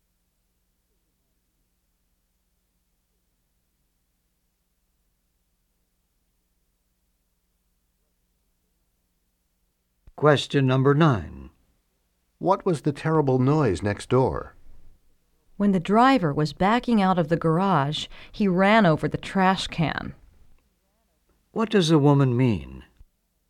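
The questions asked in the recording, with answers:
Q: What does the woman mean?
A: A driver ran over the trash can while backing out.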